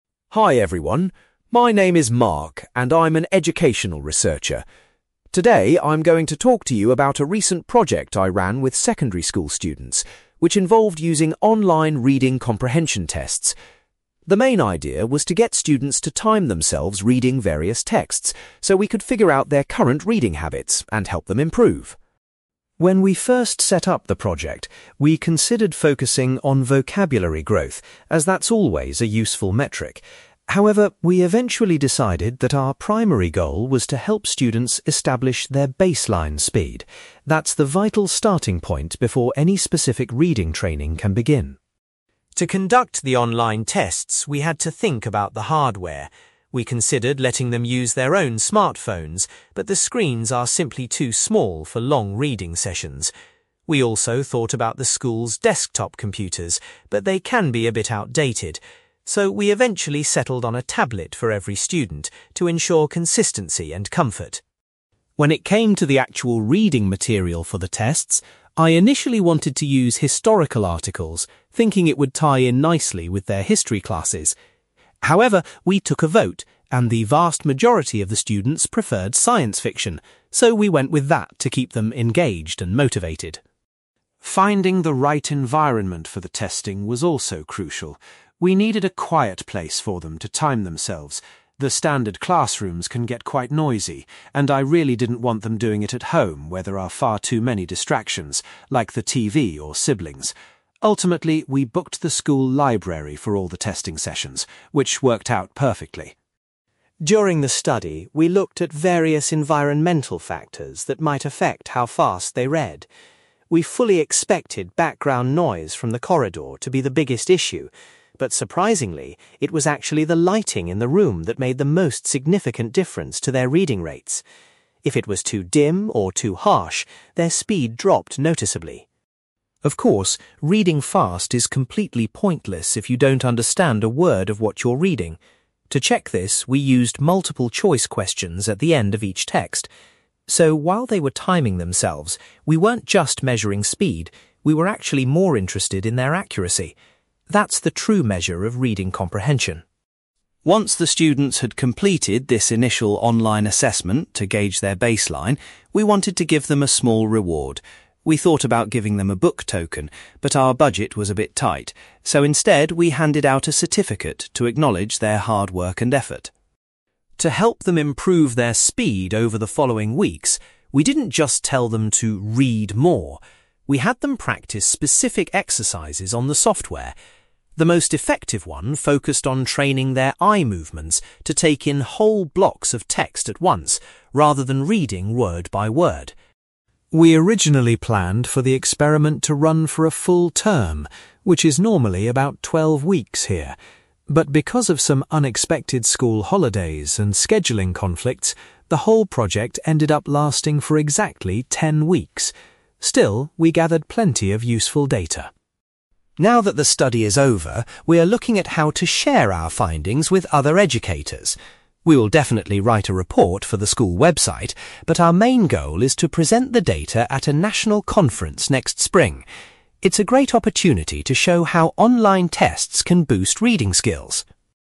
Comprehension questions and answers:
You will hear an educational researcher called Mark talking about a reading project he ran with students. For questions 9-18, complete the sentences with a word or short phrase.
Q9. Mark says the initial focus of the project was to help students find their (9)........................... before beginning the training.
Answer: baseline speed

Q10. Mark explains that each student was given a (10)........................... to use for the online reading tests.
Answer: tablet

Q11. Mark was surprised that the students chose to read (11)........................... rather than historical articles.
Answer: science fiction

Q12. Mark decided that the (12)........................... was the best place for students to take the timed tests.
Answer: school library

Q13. According to Mark, the (13)........................... had the greatest impact on how quickly students could read.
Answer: lighting

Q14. Mark emphasizes that measuring the students' (14)........................... was actually the most important part of the test.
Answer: accuracy

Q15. Students were awarded a (15)........................... after they finished the initial online assessment.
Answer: certificate

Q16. Mark says that exercises focusing on (16)........................... helped students increase their reading speed.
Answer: eye movements

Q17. The reading project ran for a total of (17)........................... .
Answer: ten weeks

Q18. Mark is hoping to present the results of his study at a (18)........................... in the spring.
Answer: national conference

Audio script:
Mark: Hi everyone, my name is Mark, and I'm an educational researcher. Today, I'm going to talk to you about a recent project I ran with secondary school students, which involved using online reading comprehension tests. The main idea was to get students to time themselves reading various texts, so we could figure out their current reading habits and help them improve.
When we first set up the project, we considered focusing on vocabulary growth, as that's always a useful metric. However, we eventually decided that our primary goal was to help students establish their baseline speed. That's the vital starting point before any specific reading training can begin.
To conduct the online tests, we had to think about the hardware. We considered letting them use their own smartphones, but the screens are simply too small for long reading sessions. We also thought about the school's desktop computers, but they can be a bit outdated. So, we eventually settled on a tablet for every student to ensure consistency and comfort.
When it came to the actual reading material for the tests, I initially wanted to use historical articles, thinking it would tie in nicely with their history classes. However, we took a vote, and the vast majority of the students preferred science fiction, so we went with that to keep them engaged and motivated.
Finding the right environment for the testing was also crucial. We needed a quiet place for them to time themselves. The standard classrooms can get quite noisy, and I really didn't want them doing it at home where there are far too many distractions, like the TV or siblings. Ultimately, we booked the school library for all the testing sessions, which worked out perfectly.
During the study, we looked at various environmental factors that might affect how fast they read. We fully expected background noise from the corridor to be the biggest issue. But surprisingly, it was actually the lighting in the room that made the most significant difference to their reading rates. If it was too dim or too harsh, their speed dropped noticeably.
Of course, reading fast is completely pointless if you don't understand a word of what you're reading! To check this, we used multiple-choice questions at the end of each text. So, while they were timing themselves, we weren't just measuring speed; we were actually more interested in their accuracy. That's the true measure of reading comprehension.
Once the students had completed this initial online assessment to gauge their baseline, we wanted to give them a small reward. We thought about giving them a book token, but our budget was a bit tight, so instead we handed out a certificate to acknowledge their hard work and effort.
To help them improve their speed over the following weeks, we didn't just tell them to 'read more'. We had them practice specific exercises on the software. The most effective one focused on training their eye movements to take in whole blocks of text at once, rather than reading word-by-word.
We originally planned for the experiment to run for a full term, which is normally about twelve weeks here. But because of some unexpected school holidays and scheduling conflicts, the whole project ended up lasting for exactly ten weeks. Still, we gathered plenty of useful data.
Now that the study is over, we are looking at how to share our findings with other educators. We will definitely write a report for the school website, but our main goal is to present the data at a national conference next spring. It's a great opportunity to show how online tests can boost reading skills.

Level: B2